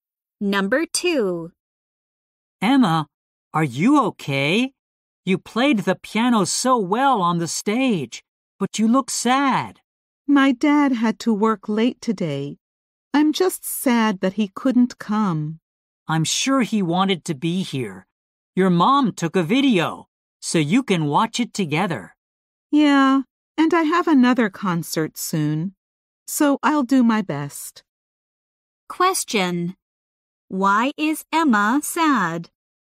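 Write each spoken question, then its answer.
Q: Why is Emma sad?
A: Her dad couldn't come to her concert.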